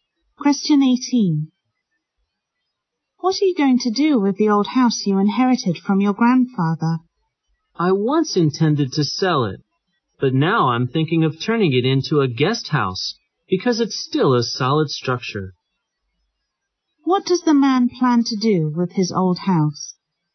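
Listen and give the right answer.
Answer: Turn it into a guest house.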